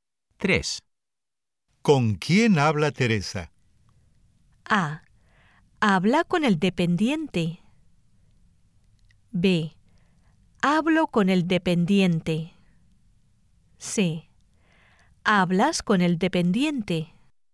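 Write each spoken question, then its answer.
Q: ¿Con quién habla Teresa?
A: A: Habla con el dependiente.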